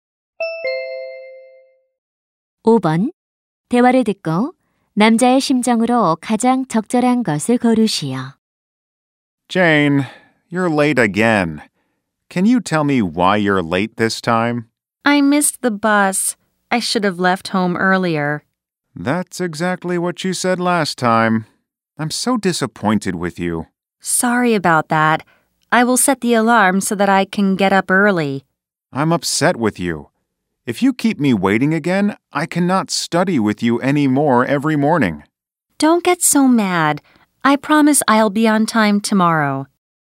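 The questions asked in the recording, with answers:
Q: 대화를 듣고 남자의 심정으로 가장 적절한 것을 고르시오.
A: 화가 나고 실망함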